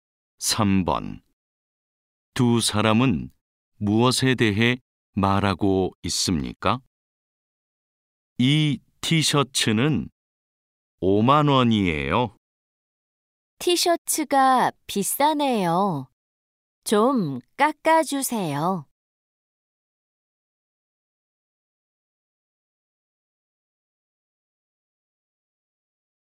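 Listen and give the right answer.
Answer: 티셔츠 가격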